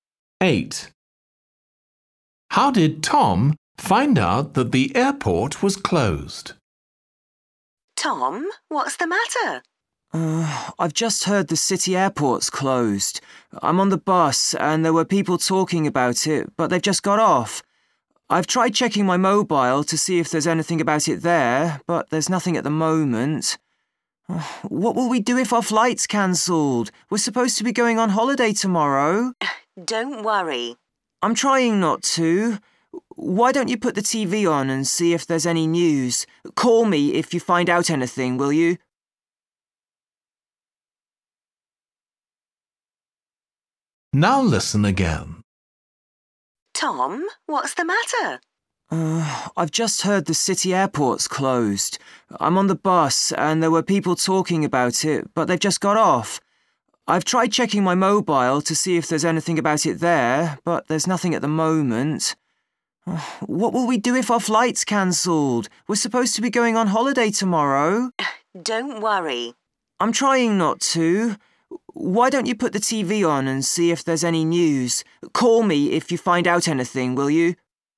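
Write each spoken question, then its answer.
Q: How did Tom find out that the airport was closed?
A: he heard people talking about it on the bus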